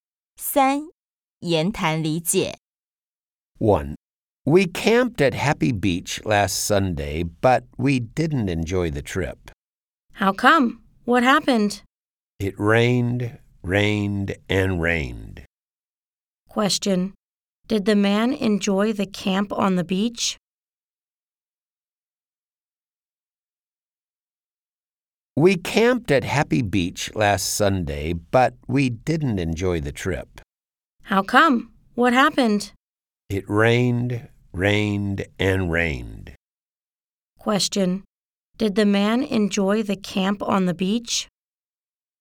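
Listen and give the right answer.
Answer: No, it rained all the time.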